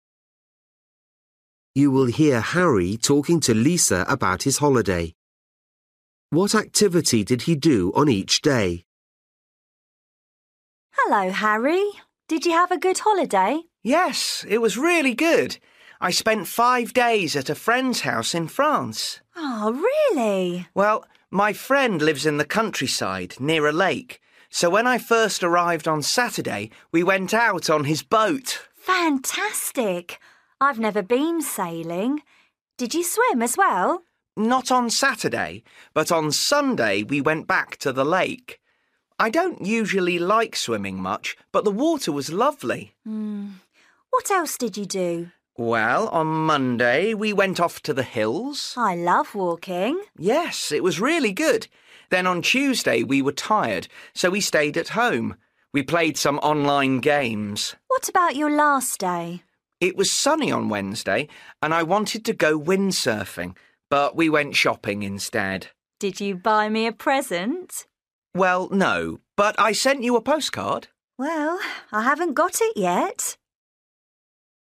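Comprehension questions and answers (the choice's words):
For each question, choose the correct answer.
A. swimming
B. going to the cinema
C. sailing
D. playing online games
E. windsurfing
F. shopping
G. sightseeing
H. walking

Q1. Saturday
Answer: sailing

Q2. Sunday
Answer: swimming

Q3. Monday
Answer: walking

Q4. Tuesday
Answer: playing online games

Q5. Wednesday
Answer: shopping

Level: Luyện nghe trình độ A2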